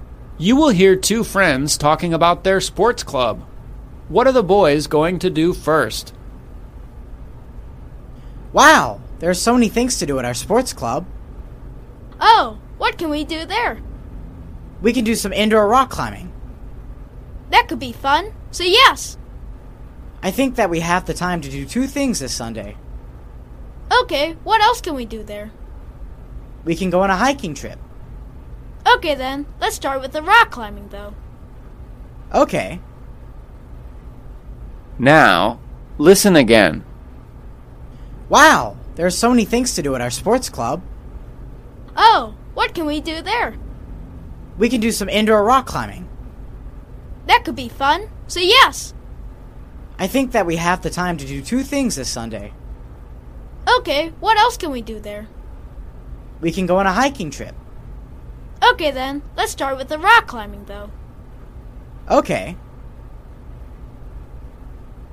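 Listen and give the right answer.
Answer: Indoor rock climbing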